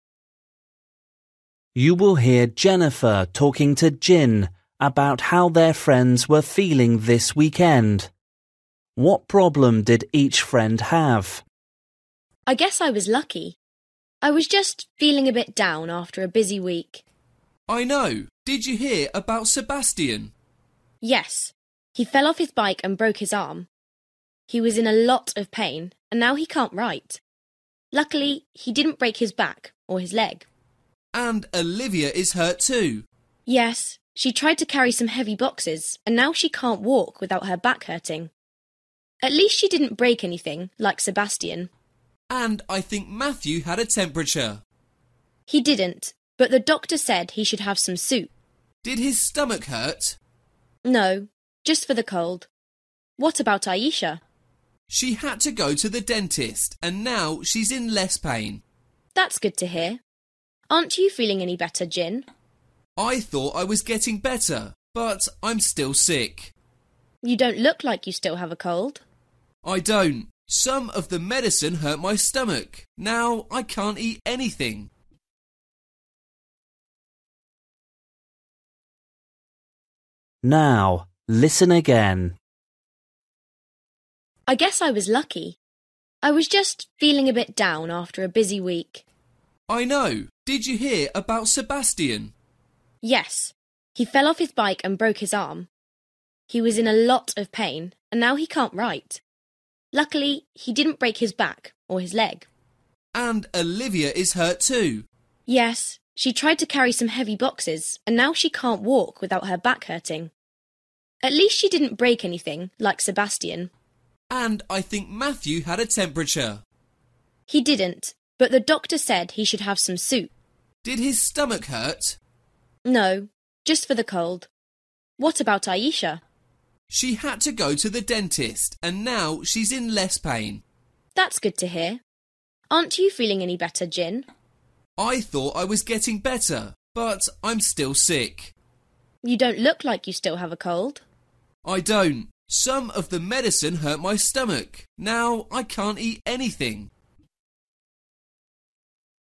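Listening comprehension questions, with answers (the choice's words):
For each question, choose the correct answer.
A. broken leg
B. cold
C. back pain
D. tired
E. stomach ache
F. broken arm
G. toothache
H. temperature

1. Sebastian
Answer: broken arm

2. Olivia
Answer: back pain

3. Matthew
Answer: cold

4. Aisha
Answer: toothache

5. Jin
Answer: stomach ache

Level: Luyện nghe trình độ A2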